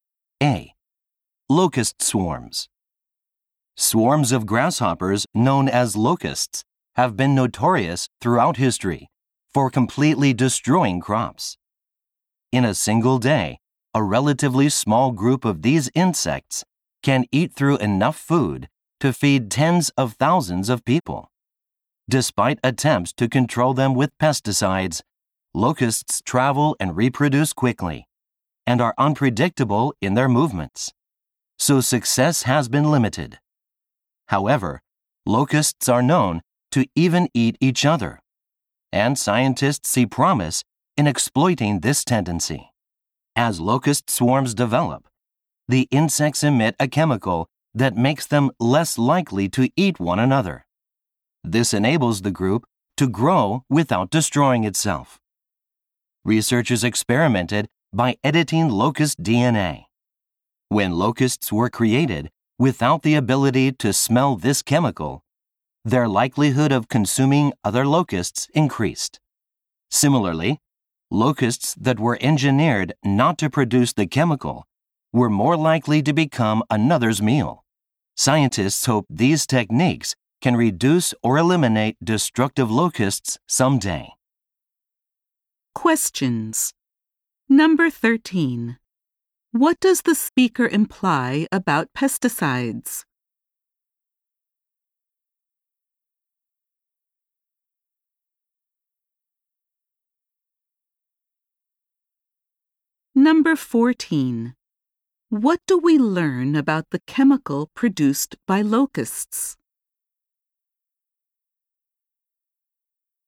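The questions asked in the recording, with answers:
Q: What does the speaker imply about pesticides?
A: They have had limited success in controlling locusts.

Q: What do we learn about the chemical produced by locusts?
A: It makes locusts less likely to eat one another.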